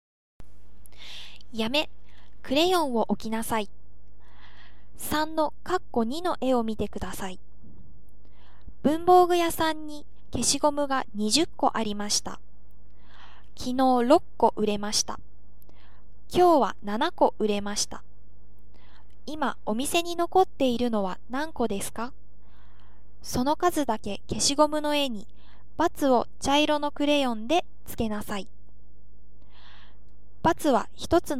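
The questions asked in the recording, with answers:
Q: 今お店に残っているのは何個ですか?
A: 7個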